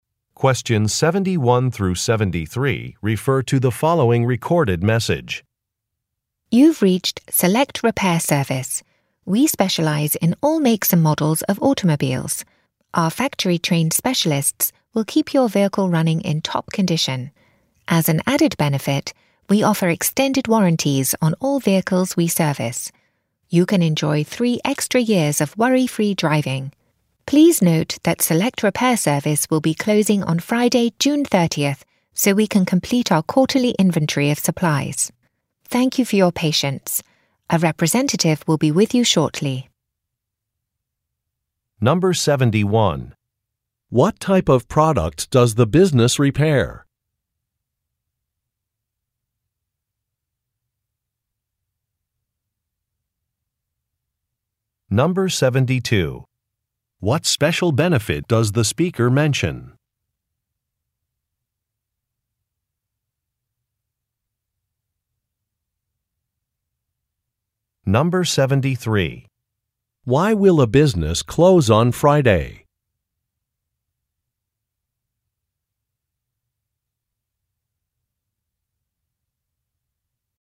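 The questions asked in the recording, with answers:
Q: What type of product does the business repair?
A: Automobiles

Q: What special benefit does the speaker mention?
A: Extended warranties (3 extra years)

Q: Why will a business close on Friday?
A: To complete its quarterly inventory of supplies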